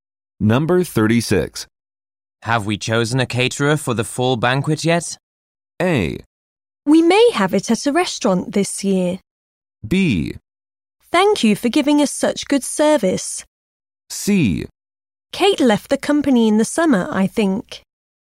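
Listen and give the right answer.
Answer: A: We may have it at a restaurant this year.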